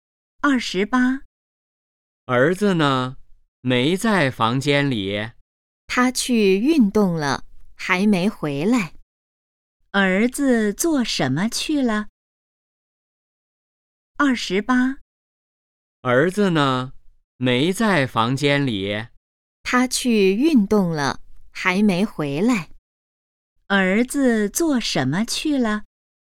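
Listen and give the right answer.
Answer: 去运动了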